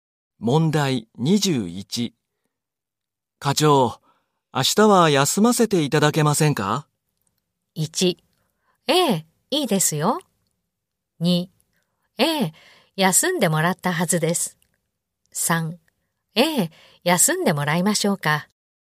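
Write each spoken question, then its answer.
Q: 課長、明日は休ませていただけませんか?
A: 1: ええ、いいですよ。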